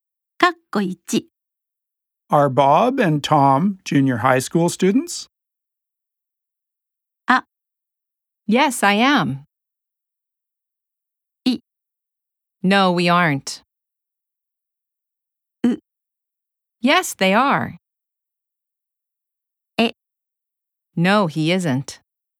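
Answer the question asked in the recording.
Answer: C: Yes, they are.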